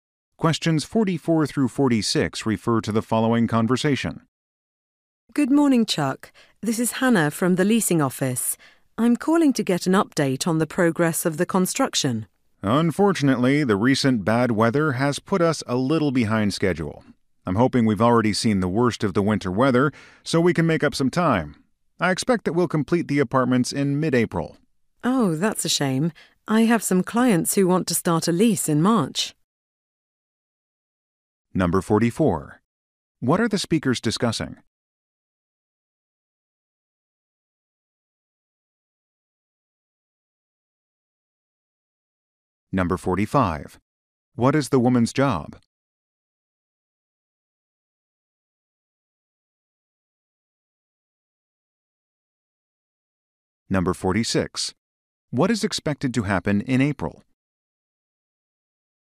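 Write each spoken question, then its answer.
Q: What are the speakers discussing?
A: Progress of apartment construction

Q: What is the woman's job?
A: Leasing agent

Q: What is expected to happen in April?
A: The apartments will be completed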